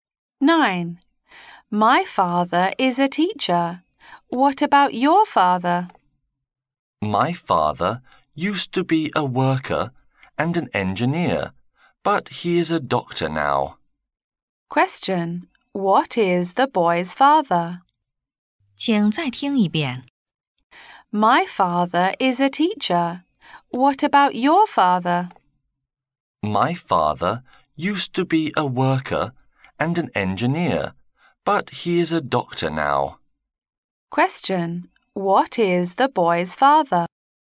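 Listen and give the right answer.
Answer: A doctor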